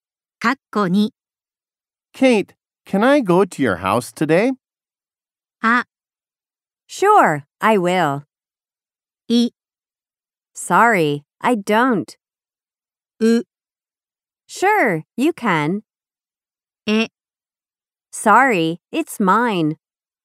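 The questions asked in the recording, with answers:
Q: Kate, can I go to your house today?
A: う: Sure, you can.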